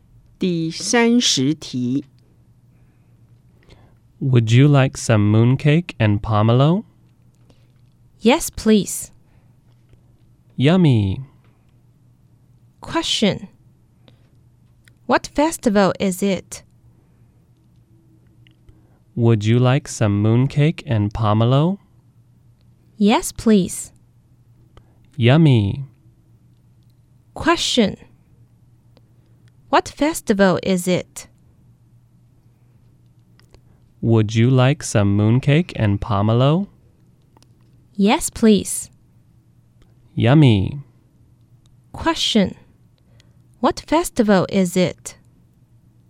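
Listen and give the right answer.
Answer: Moon Festival (Mid-Autumn Festival)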